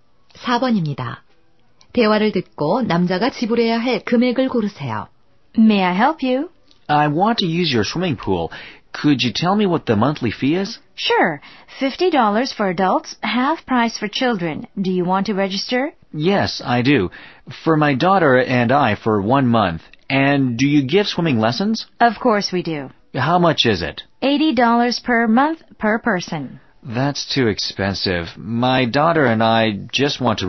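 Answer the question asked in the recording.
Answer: 75달러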